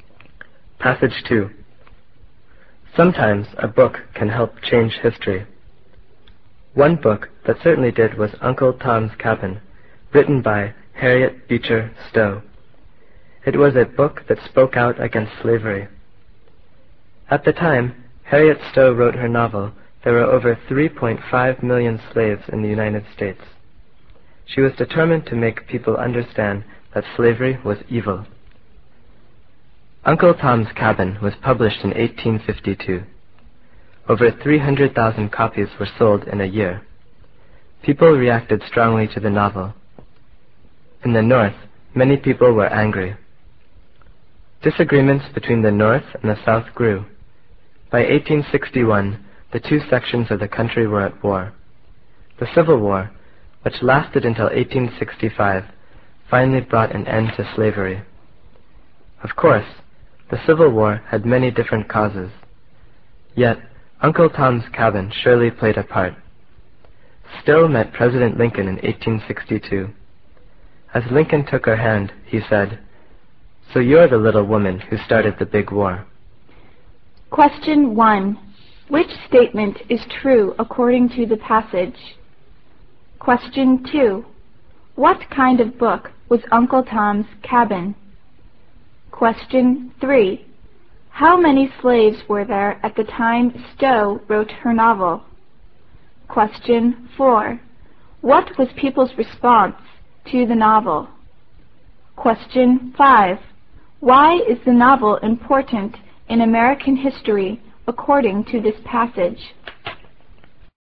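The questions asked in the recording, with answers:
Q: What kind of book was Uncle Tom's Cabin?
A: A novel that spoke out against slavery

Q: How many slaves were there at the time Stowe wrote her novel?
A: Over 3.5 million

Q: What was people's response to the novel?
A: They reacted strongly; many in the North were angry

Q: Why is the novel important in American history according to this passage?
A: It played a part in causing the Civil War, which ended slavery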